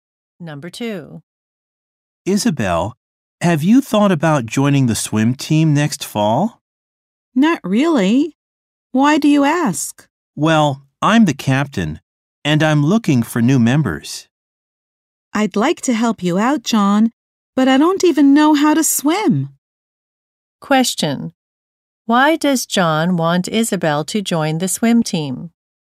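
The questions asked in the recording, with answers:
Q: Why does John want Isabel to join the swim team?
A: He is the captain and is looking for new members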